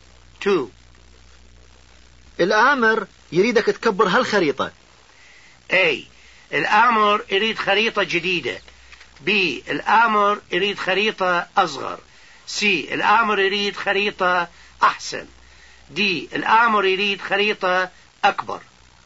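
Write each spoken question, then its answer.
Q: الآمر يريدك تكبر هالخريطة.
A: D: الآمر يريد خريطة أكبر.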